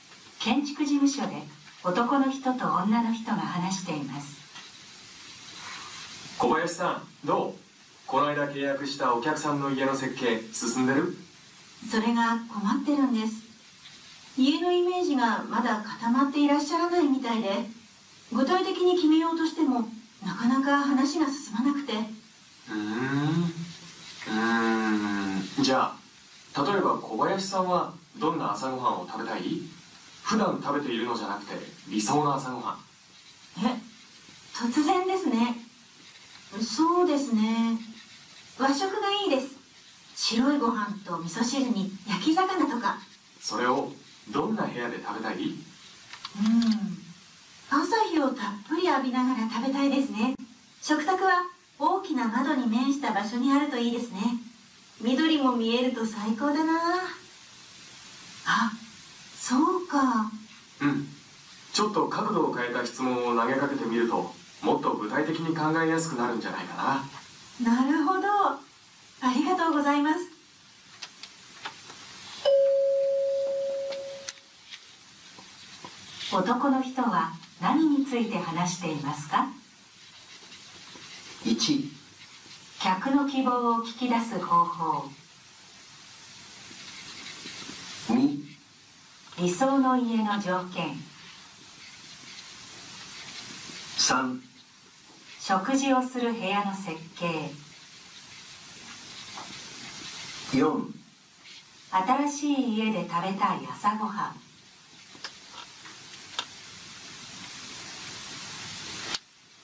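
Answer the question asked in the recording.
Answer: 1: 客の希望を聞き出す方法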